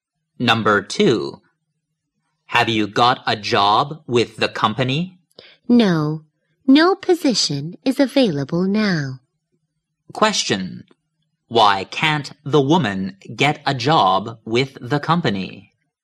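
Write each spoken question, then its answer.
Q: Why can't the woman get a job with the company?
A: No position is available now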